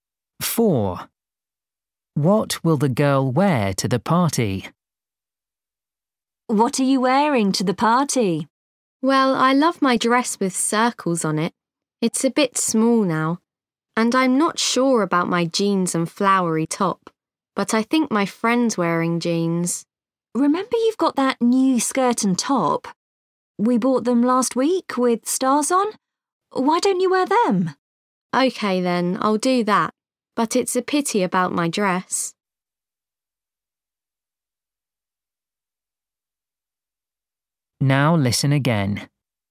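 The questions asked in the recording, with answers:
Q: What will the girl wear to the party?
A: her new skirt and top with stars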